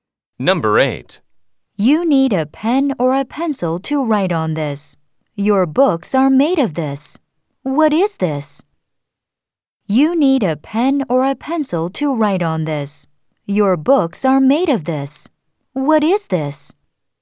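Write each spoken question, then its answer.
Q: What is this?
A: paper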